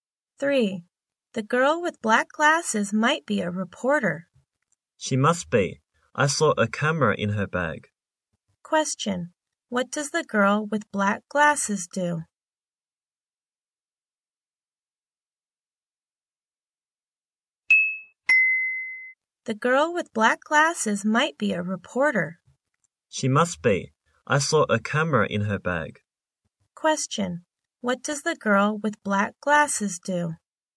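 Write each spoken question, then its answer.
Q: What does the girl with black glasses do?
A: She is a reporter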